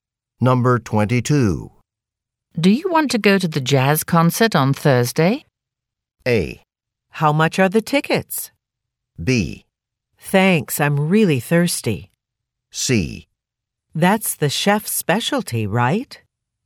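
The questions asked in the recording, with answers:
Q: Do you want to go to the jazz concert on Thursday?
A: A: How much are the tickets?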